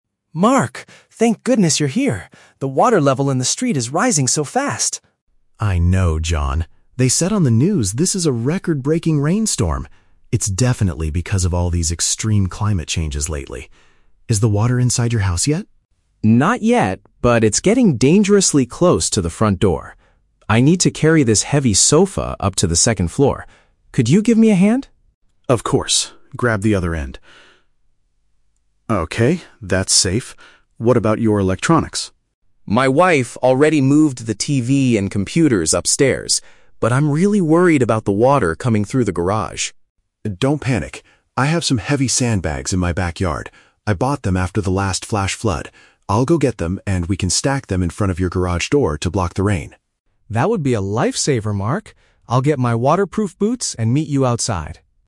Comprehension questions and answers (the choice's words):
Listen to a conversation between two neighbors during a severe storm. Choose the correct answer (A, B, or C) for each question.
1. Why is Mark helping John today?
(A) Because John is moving to a new neighborhood.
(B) Because a severe rainstorm is threatening John's home.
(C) Because they are cleaning the street together.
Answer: Because a severe rainstorm is threatening John's home.

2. What has John's wife already done?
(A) She relocated the electrical devices to a higher level.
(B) She carried the heavy sofa to the second floor.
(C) She went to the store to buy waterproof boots.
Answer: She relocated the electrical devices to a higher level.

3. How will the men try to protect the garage from the flood?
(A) By moving John's car to a safer place.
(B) By waiting for the local emergency team to arrive.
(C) By building a barrier with heavy bags of sand.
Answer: By building a barrier with heavy bags of sand.

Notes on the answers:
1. John says the water level is "rising so fast" and getting "close to the front door" due to a "record-breaking rainstorm." Mark is there to help him protect his house. (Paraphrasing: severe rainstorm = record-breaking rainstorm).
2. John says, "My wife already moved the TV and computers upstairs." (Paraphrasing: relocated = moved; electrical devices = TV and computers; higher level = upstairs).
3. Mark says he will get some "sandbags" and they can "stack them in front of your garage door to block the rain." (Paraphrasing: barrier with heavy bags of sand = stack heavy sandbags to block the rain).

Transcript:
John: Mark! Thank goodness you're here. The water level in the street is rising so fast.
Mark: I know, John. They said on the news this is a record-breaking rainstorm. It's definitely because of all these extreme climate changes lately. Is the water inside your house yet?
John: Not yet, but it's getting dangerously close to the front door. I need to carry this heavy sofa up to the second floor. Could you give me a hand?
Mark: Of course. Grab the other end. (Sound of effort) Okay, that's safe. What about your electronics?
John: My wife already moved the TV and computers upstairs. But I'm really worried about the water coming through the garage.
Mark: Don't panic. I have some heavy sandbags in my backyard. I bought them after the last flash flood. I'll go get them, and we can stack them in front of your garage door to block the rain.